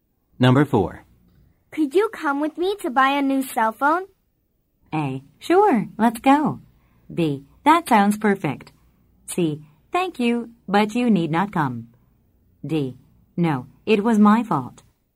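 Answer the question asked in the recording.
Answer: A: Sure, let's go.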